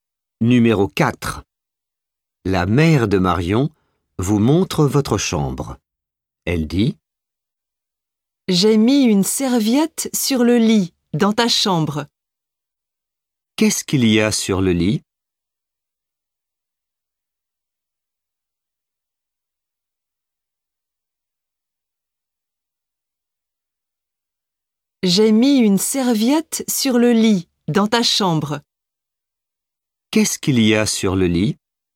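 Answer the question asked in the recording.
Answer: Une serviette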